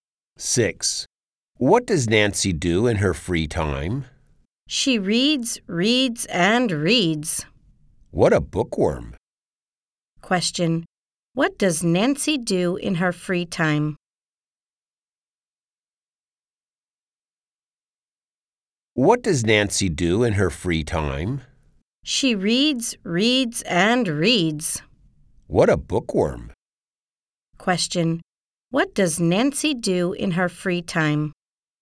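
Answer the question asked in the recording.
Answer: She reads.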